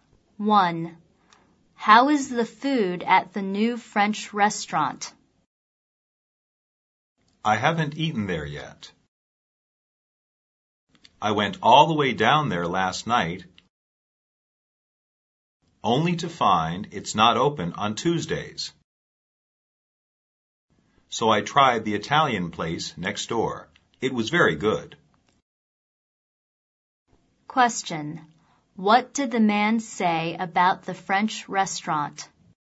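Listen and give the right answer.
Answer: It isn't open on Tuesdays, so he hasn't eaten there yet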